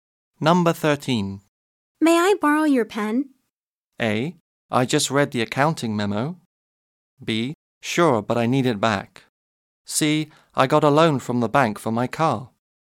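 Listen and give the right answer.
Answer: B: Sure, but I need it back.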